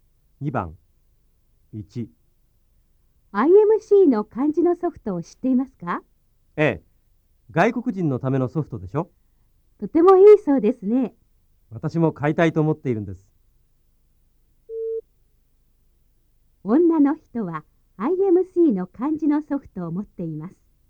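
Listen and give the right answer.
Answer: ×(持っていません。買いたいと思っています)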